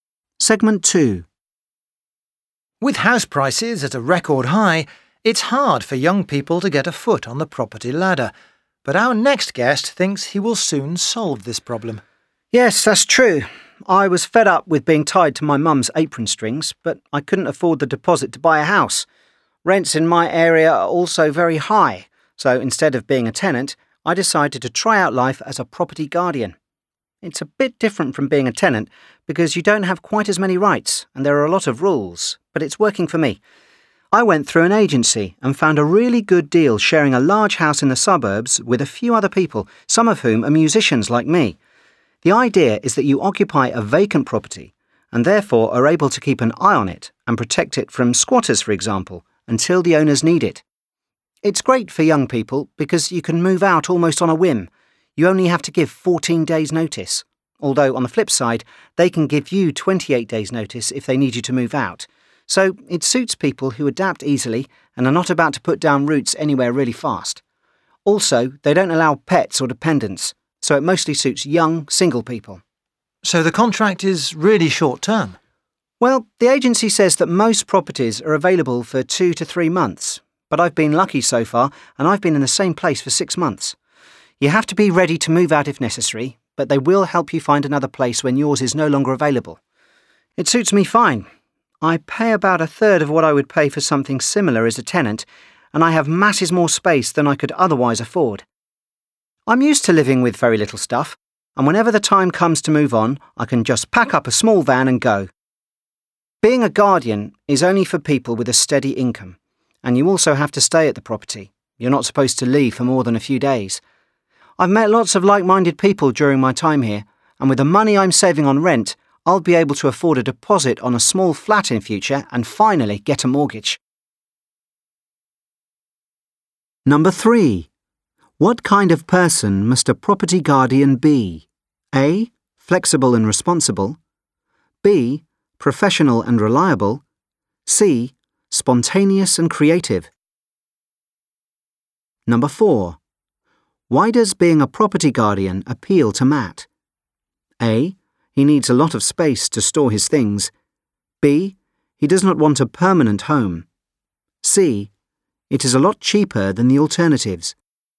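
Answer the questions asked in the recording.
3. A: Flexible and responsible.
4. C: It is a lot cheaper than the alternatives.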